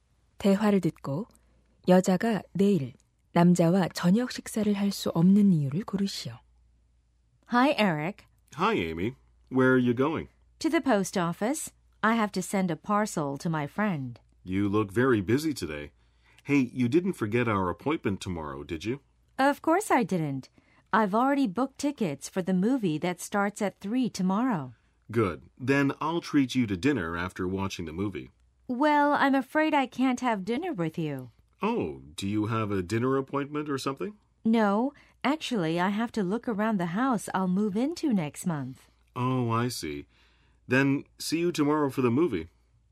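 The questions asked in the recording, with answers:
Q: 대화를 듣고 여자가 내일 남자와 저녁 식사를 할 수 없는 이유를 고르시오.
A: 다음 달에 이사 갈 집을 둘러봐야 해서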